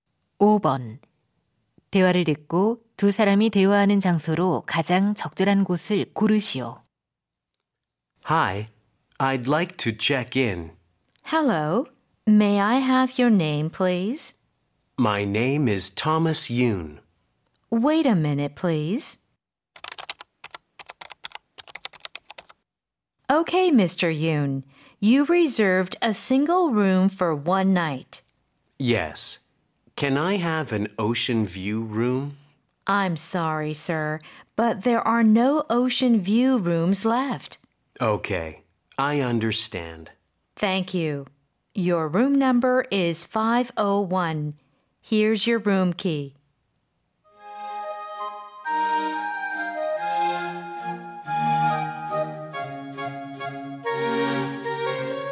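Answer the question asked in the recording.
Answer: 호텔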